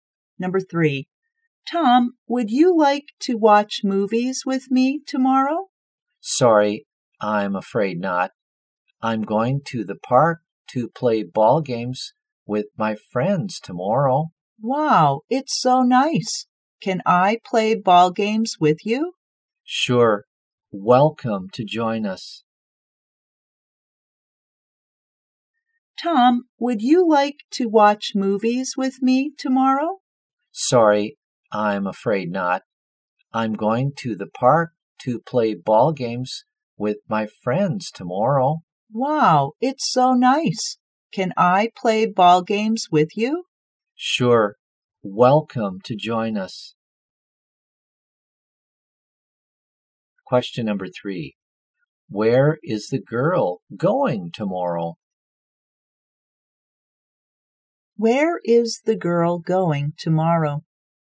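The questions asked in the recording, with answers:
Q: Where is the girl going tomorrow?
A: To the park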